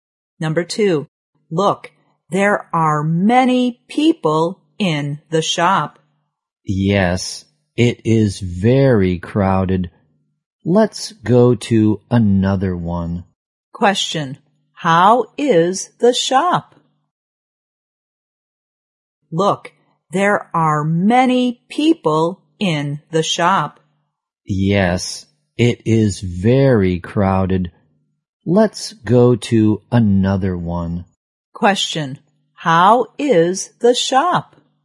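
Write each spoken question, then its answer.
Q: how is the shop?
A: It is very crowded.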